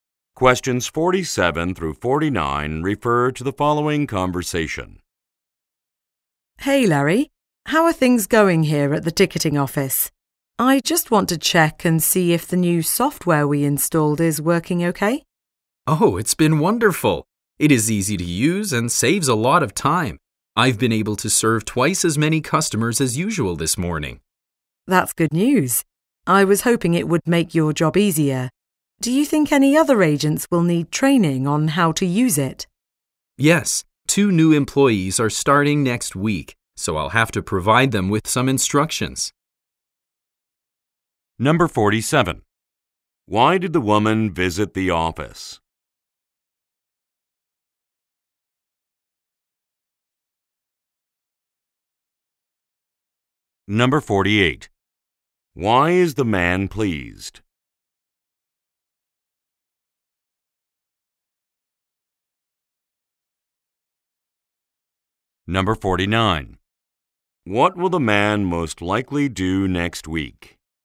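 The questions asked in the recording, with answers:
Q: Why did the woman visit the office?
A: To check if the new software is working

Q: Why is the man pleased?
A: The software saves time; he serves more customers

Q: What will the man most likely do next week?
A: Train new employees on the software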